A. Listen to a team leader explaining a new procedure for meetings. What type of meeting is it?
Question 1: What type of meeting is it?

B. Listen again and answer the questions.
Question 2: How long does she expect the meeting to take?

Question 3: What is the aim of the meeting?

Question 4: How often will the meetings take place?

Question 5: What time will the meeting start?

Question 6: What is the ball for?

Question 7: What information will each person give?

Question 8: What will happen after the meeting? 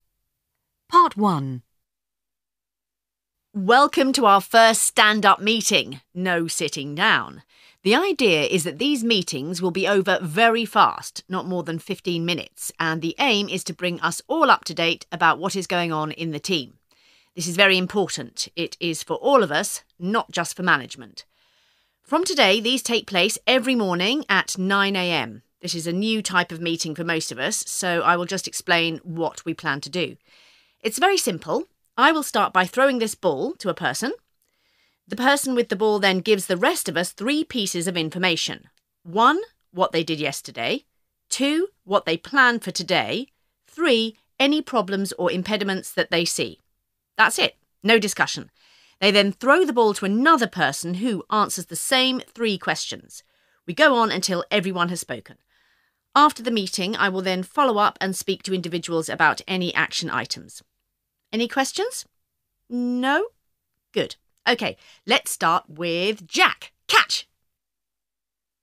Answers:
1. a stand-up meeting
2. fifteen minutes
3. to bring everyone up to date about what is going on in the team
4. every morning
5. 9 a.m.
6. to decide who speaks
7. what they did yesterday, what they plan to do today, any impediments
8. The team leader will discuss follow-up action with individuals as necessary.

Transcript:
Part 1
Welcome to our first stand-up meeting. No sitting down. The idea is that these meetings will be over very fast, not more than fifteen minutes, and the aim is to bring us all up to date about what is going on in the team. This is very important. It is for all of us, not just for management.
From today these take place every morning at 9 a.m. This is a new type of meeting for most of us, so I will just explain what we plan to do.
It's very simple. I will start by throwing this ball to a person. The person with the ball then gives the rest of us three pieces of information. One: What they did yesterday. Two: What they plan for today. Three: Any problems or impediments that they see. That's it. No discussion. They then throw the ball to another person, who answers the same three questions. We go on until everyone has spoken. After the meeting I will then follow up and speak to individuals about any action items. Any questions? No? Good. OK. Let's start with Jack.